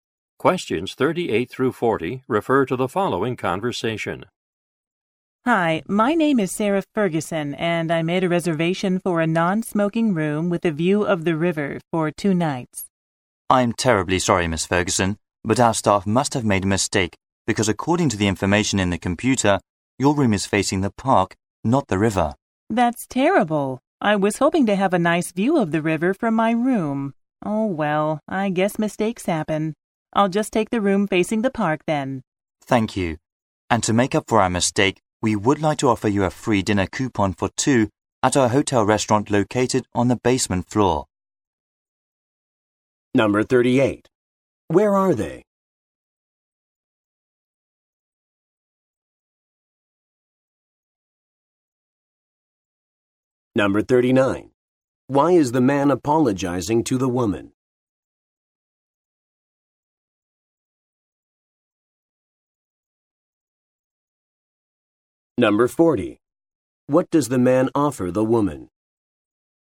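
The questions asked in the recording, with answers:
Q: Where are they?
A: At a hotel

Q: Why is the man apologizing to the woman?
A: Her room faces the park, not the river as reserved

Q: What does the man offer the woman?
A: A free dinner coupon for two at the hotel restaurant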